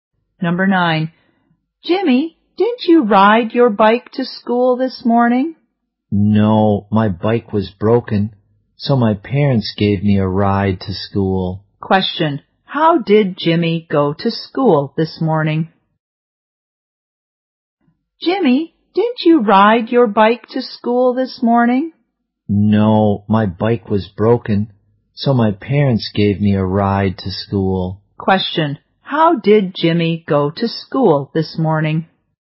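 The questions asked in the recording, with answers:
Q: how did Jimmy go to school this morning?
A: His parents drove him (by car)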